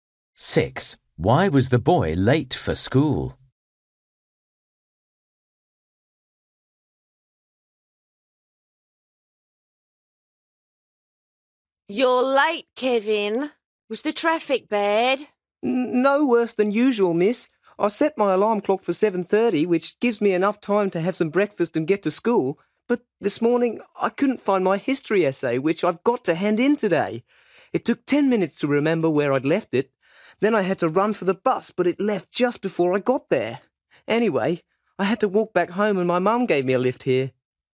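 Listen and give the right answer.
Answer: He missed the bus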